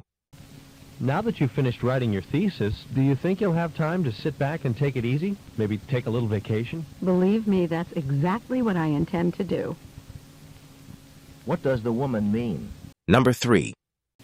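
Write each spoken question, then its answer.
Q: What does the woman mean?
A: She plans to relax and take a vacation.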